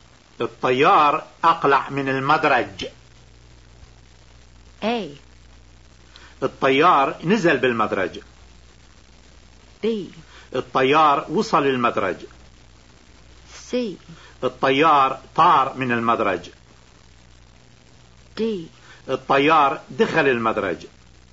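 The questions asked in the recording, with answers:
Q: الطيار أقلع من المدرج.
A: C: الطيار طار من المدرج.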